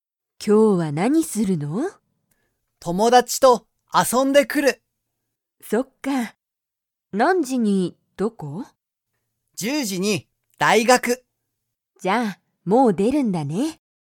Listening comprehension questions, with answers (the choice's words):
ケンは、もう出(で)ますか?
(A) はい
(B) いいえ)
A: はい

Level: Level 1